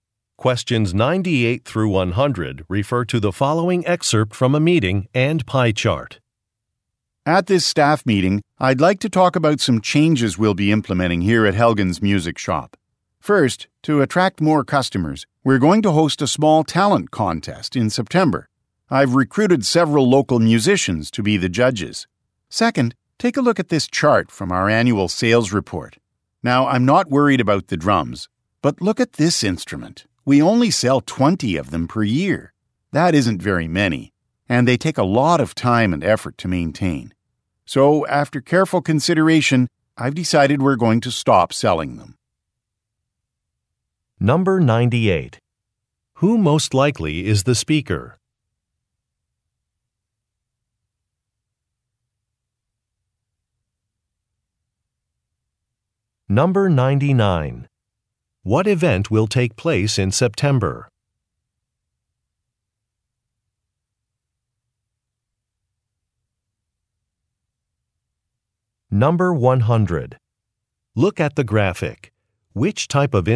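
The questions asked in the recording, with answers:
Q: What event will take place in September?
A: A small talent contest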